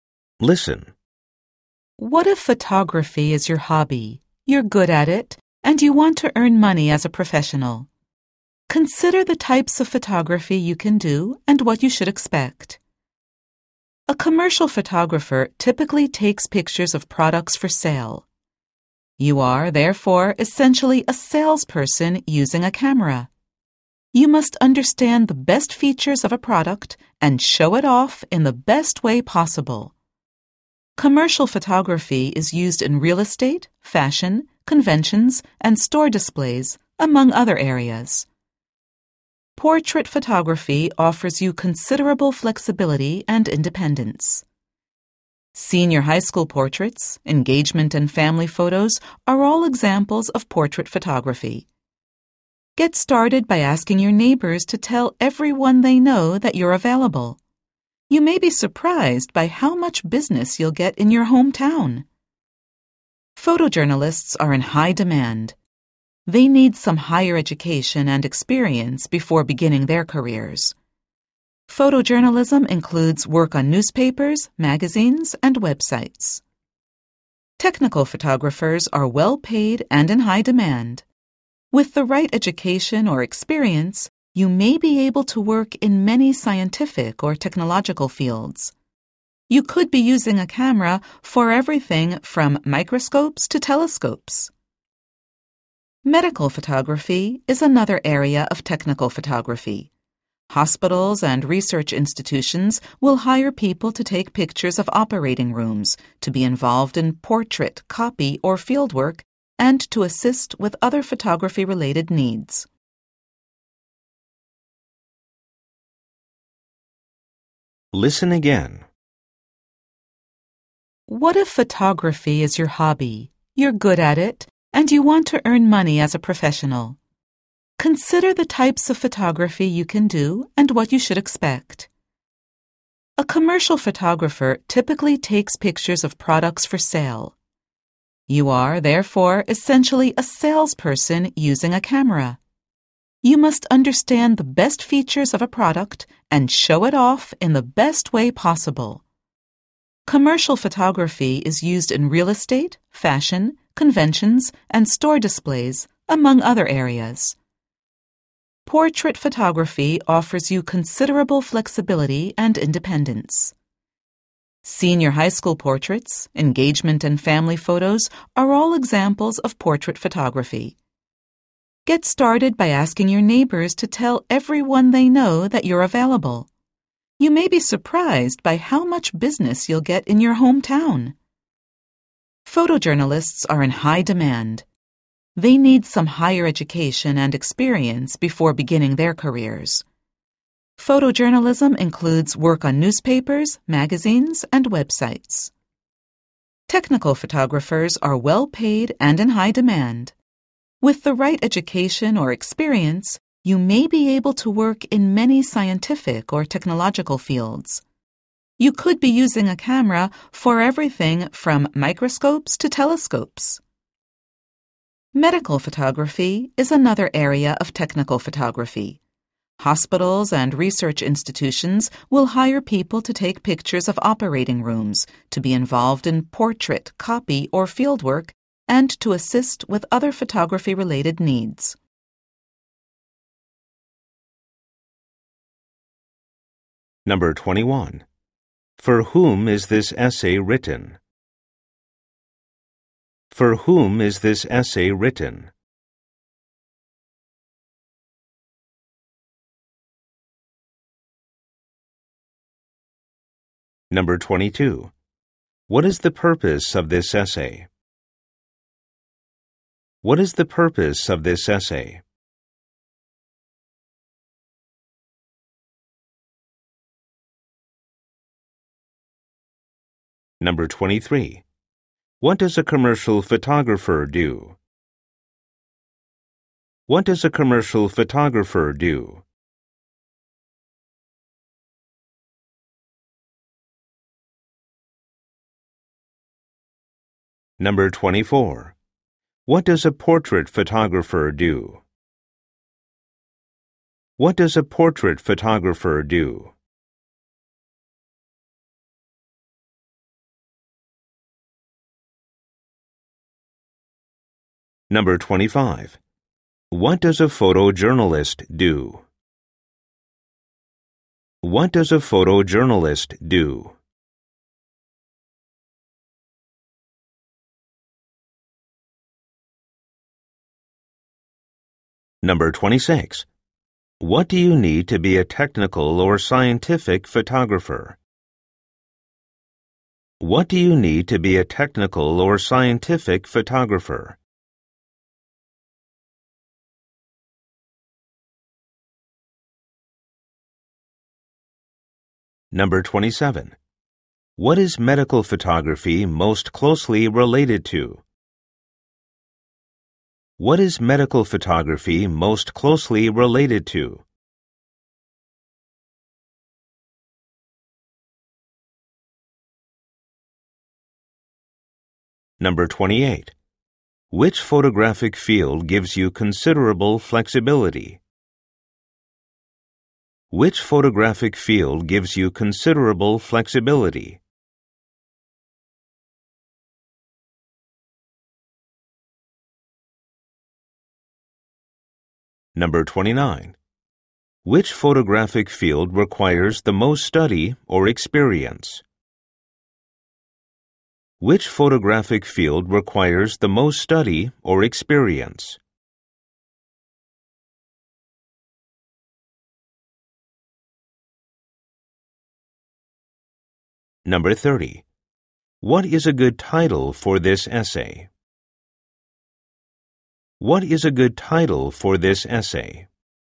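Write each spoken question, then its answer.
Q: For whom is this essay written?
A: People whose hobby is photography and who want to earn money as professionals

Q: What does a commercial photographer do?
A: Takes pictures of products for sale

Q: What does a portrait photographer do?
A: Takes portraits such as senior high school, engagement and family photos

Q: What does a photojournalist do?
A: Works for newspapers, magazines and websites

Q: What do you need to be a technical or scientific photographer?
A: The right education or experience

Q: What is medical photography most closely related to?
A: Technical photography

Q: Which photographic field gives you considerable flexibility?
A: Portrait photography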